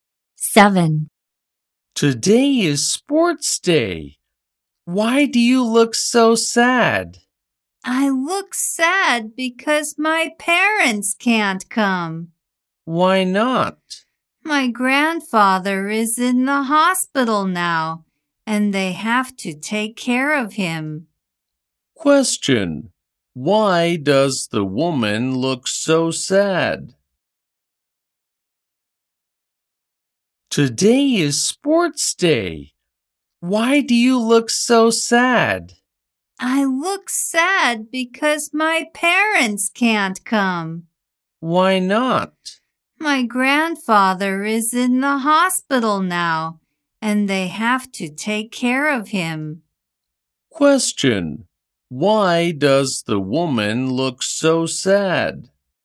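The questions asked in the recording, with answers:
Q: Question, why does the woman look so sad?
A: Her parents can't come to sports day.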